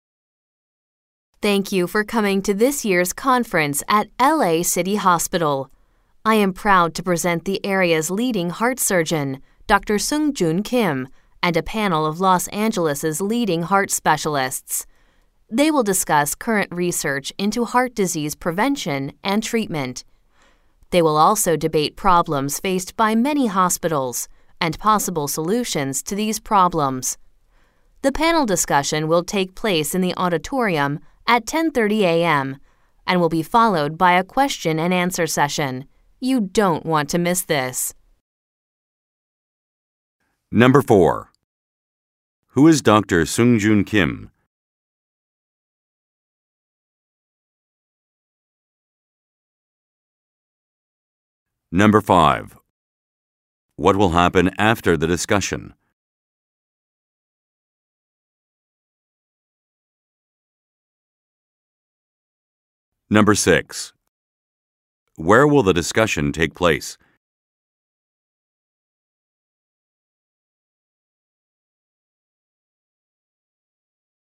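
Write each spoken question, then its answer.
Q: Who is Dr. Sungjoon Kim?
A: A leading heart surgeon

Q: What will happen after the discussion?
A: A question and answer session

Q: Where will the discussion take place?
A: In the auditorium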